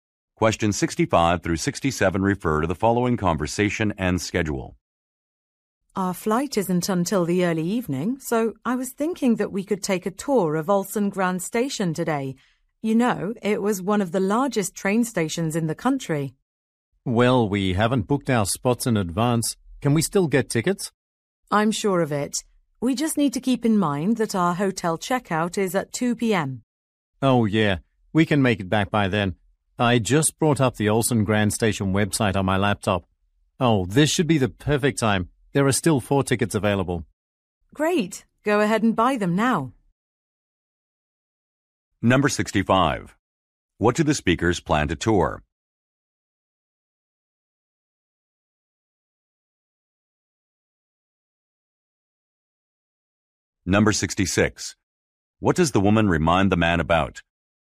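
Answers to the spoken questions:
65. A train station
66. The 2 p.m. hotel checkout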